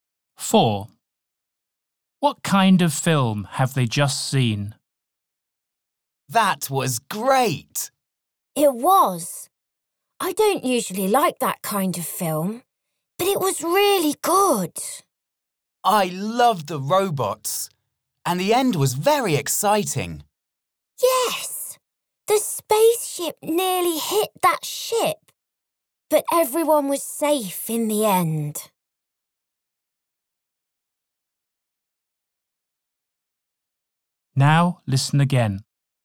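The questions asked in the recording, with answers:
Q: What kind of film have they just seen?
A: A science fiction film (robots and spaceships)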